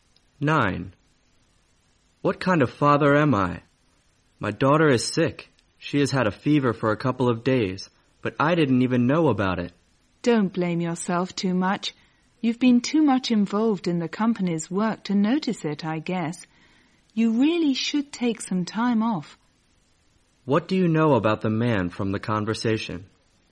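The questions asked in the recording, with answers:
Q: What do you know about the man from the conversation?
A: He is so busy with work that he didn't notice his daughter was sick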